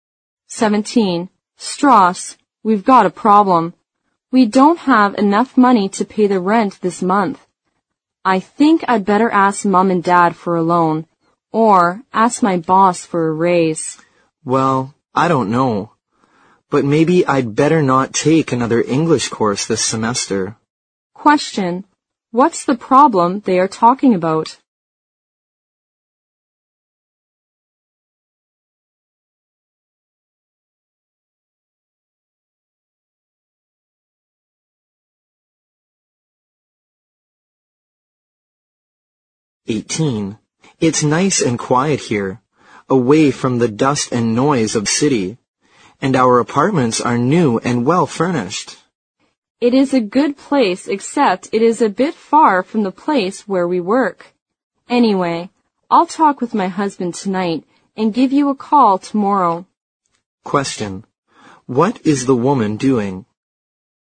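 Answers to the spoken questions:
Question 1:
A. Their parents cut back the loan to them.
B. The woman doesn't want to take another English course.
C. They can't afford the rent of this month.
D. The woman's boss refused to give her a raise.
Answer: C. They can't afford the rent of this month.
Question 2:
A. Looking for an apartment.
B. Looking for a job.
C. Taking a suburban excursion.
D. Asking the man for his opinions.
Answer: A. Looking for an apartment.

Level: 六级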